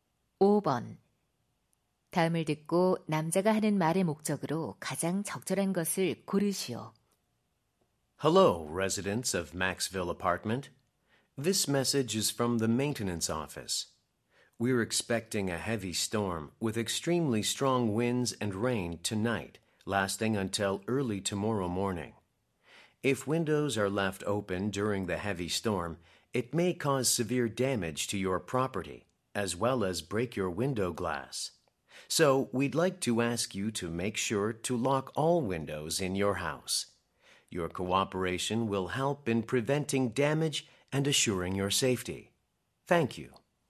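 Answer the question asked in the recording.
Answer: 폭풍에 대비해 모든 창문을 잠그도록 요청하려고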